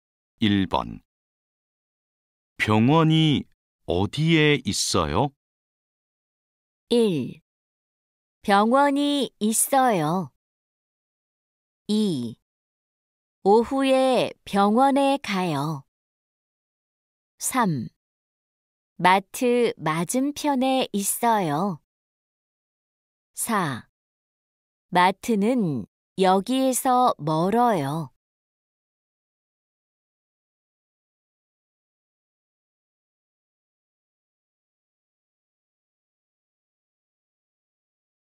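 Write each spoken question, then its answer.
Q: 병원이 어디에 있어요?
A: 3: 마트 맞은편에 있어요.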